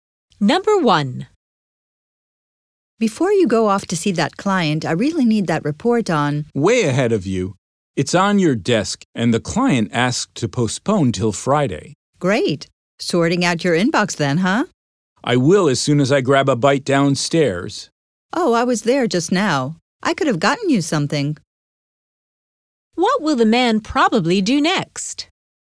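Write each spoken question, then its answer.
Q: What will the man probably do next?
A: Go downstairs to get something to eat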